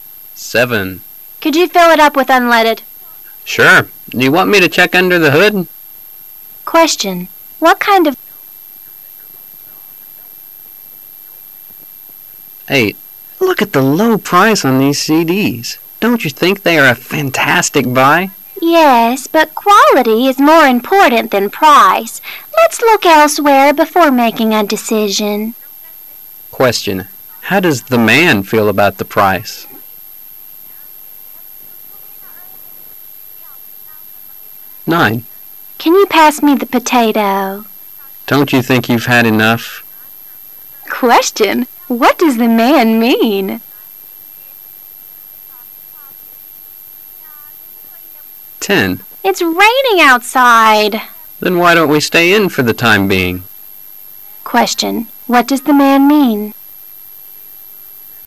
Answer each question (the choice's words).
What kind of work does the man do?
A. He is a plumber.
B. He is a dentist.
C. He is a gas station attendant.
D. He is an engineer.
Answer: He is a gas station attendant.

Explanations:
人物职业身份题。 [详细解答] 由对话中的信息关键词unleaded(无铅汽油),fill it up (加满),hood(汽车盖)可知对话发生在加油站。因此正确答案为C。